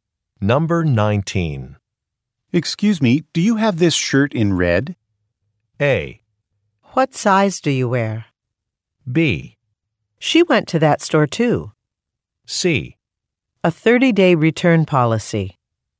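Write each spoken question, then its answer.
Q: Excuse me, do you have this shirt in red?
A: A: What size do you wear?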